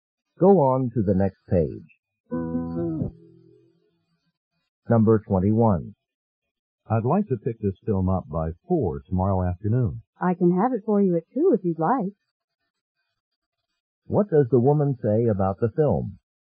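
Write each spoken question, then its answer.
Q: What does the woman say about the film?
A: It can be ready earlier, at 2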